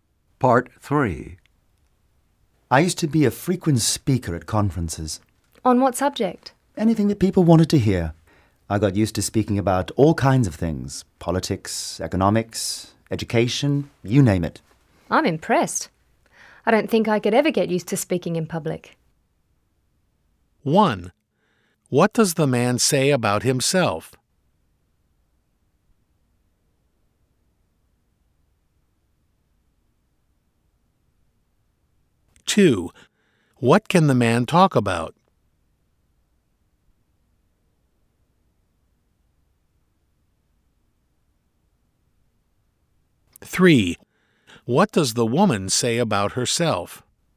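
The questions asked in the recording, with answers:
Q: What does the man say about himself?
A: He used to speak frequently at conferences.

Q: What can the man talk about?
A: All kinds of things: politics, economics, education.

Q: What does the woman say about herself?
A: She couldn't get used to speaking in public.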